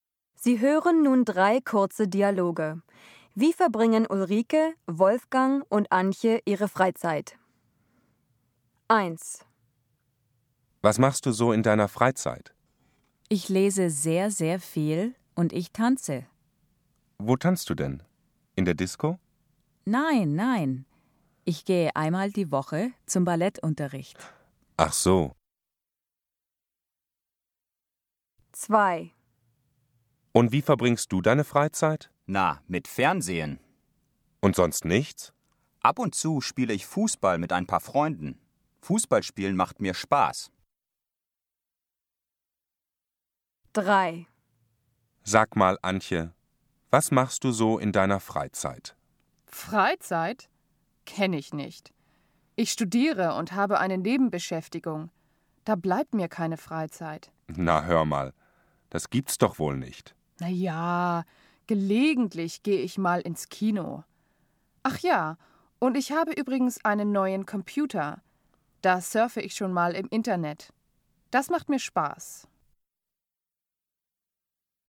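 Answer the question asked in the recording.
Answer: Ulrike liest viel und tanzt (Ballettunterricht); Wolfgang sieht fern und spielt ab und zu Fußball; Antje geht gelegentlich ins Kino und surft im Internet.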